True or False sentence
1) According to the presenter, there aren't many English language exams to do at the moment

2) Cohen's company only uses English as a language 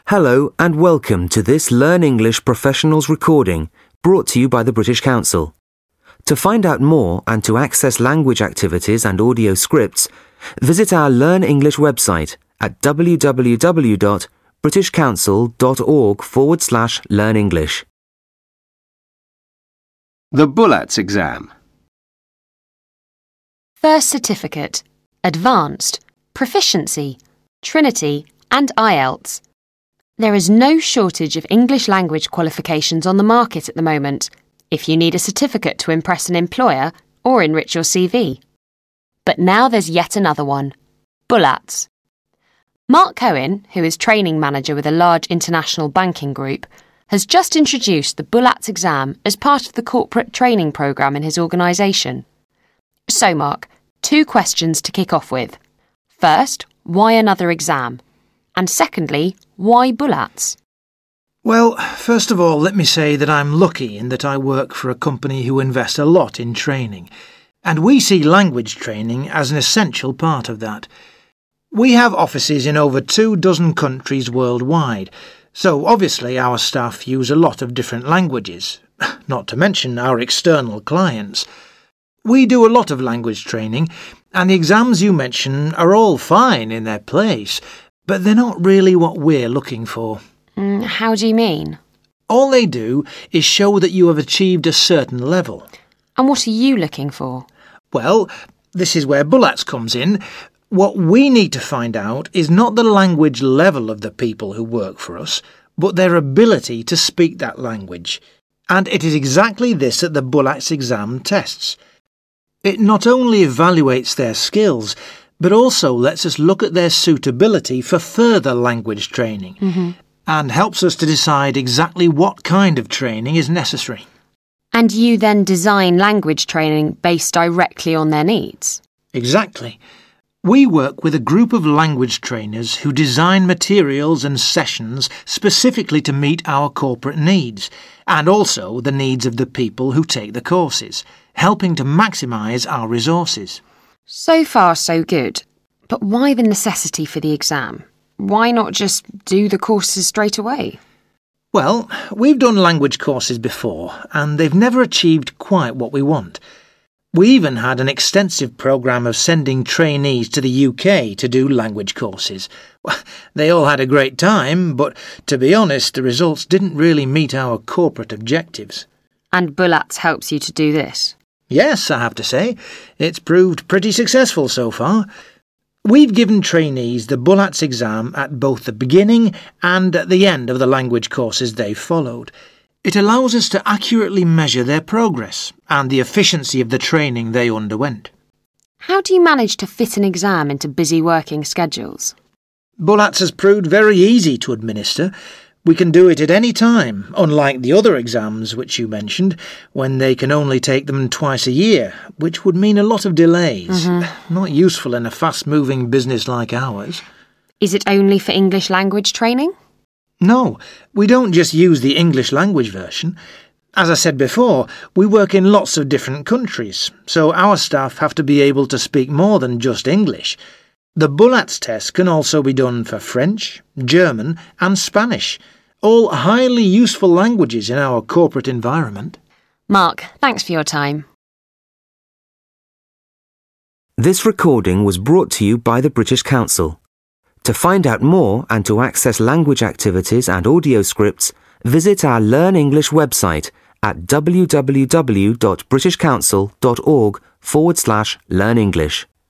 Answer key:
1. F
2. F

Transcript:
Interviewer: First Certificate, Advanced, Proficiency, Trinity and IELTS – there is no shortage of English language qualifications on the market at the moment if you need a certificate to impress an employer or enrich your CV.But now there's yet another one – BULATS. Mark Cohen, who is training manager with a large international banking group, has just introduced the BULATS exam as part of the corporate training programme in his organisation.So, Mark, two questions to kick off with, first why another exam? And secondly, why BULATS
Mark Cohen: Well, first of all let me say that I'm lucky in that I work for a company who invest a lot in training – and we see language training as an essential part of that. We have offices in over two dozen countries worldwide, so obviously our staff use a lot of different languages – not to mention our external clients! We do a lot of language training, and the exams you mention are all fine in their place, but they're not really what we're looking for
Interviewer: How do you mean
Mark Cohen: All they do is show that you have achieved a certain level
Interviewer: And what are you looking for
Mark Cohen: Well – this is where BULATS comes in – what we need to find out is not the language level of the people who work for us, but their ability to speak that language.And it is exactly this that the BULATS exam tests. It not only evaluates their skills, but also lets us look at their suitability for further language training, and helps us to decide exactly what kind of training is necessary
Interviewer: And you then design language training based directly on their needs
Mark Cohen: Exactly – we work with a group of language trainers who design materials and sessions specifically to meet our corporate needs, and also the needs of the people who take the courses – helping to maximise our resources
Interviewer: So far so good – but why the necessity for the exam? Why not just do the courses straight away
Mark Cohen: Well, we've done language courses before and they've never achieved quite what we want. We even had an extensive programme of sending trainees to the UK to do languages courses – they all had a great time, but to be honest the results didn't really meet our corporate objectives
Interviewer: And BULATS helps you to do this
Mark Cohen: Yes, I have to say – it's proved pretty successful so far. We've given trainees the BULATS exam at both the beginning and at the end of the language courses they've followed – it allows us to accurately measure their progress, and the efficiency of the training they underwent
Interviewer: How do you manage to fit an exam into busy working schedules
Mark Cohen: BULATS has proved very easy to administer – we can do it at any time, unlike the other exams which you mentioned, when they can only take them twice a year, which would mean a lot of delays – not useful in a fastmoving business like ours
Interviewer: Is it only for English language training
Mark Cohen: No we don't just use the English language version. As I said before, we work in lots of different countries, so our staff have to be able to speak more than just English – the BULATS test can also be done for French, German and Spanish– all highly useful languages in our corporate environment
Interviewer: Mark, thanks for your time